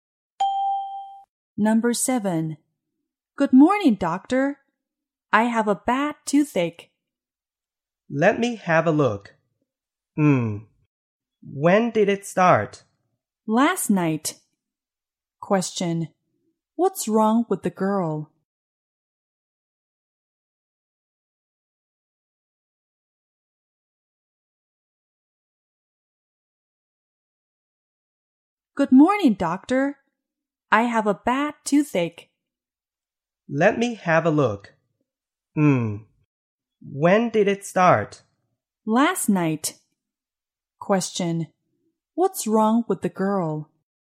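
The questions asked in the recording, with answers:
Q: What's wrong with the girl?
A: She has a bad toothache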